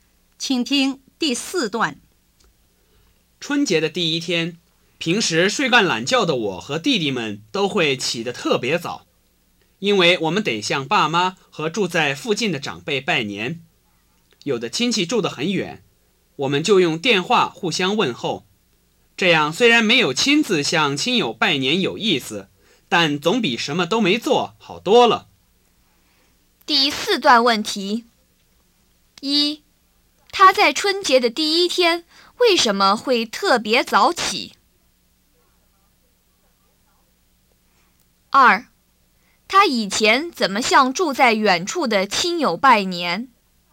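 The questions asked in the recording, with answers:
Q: 他在春节的第一天为什么会特别早起?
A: 要向爸妈和住在附近的长辈拜年

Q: 他以前怎么向住在远处的亲友拜年?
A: 用电话互相问候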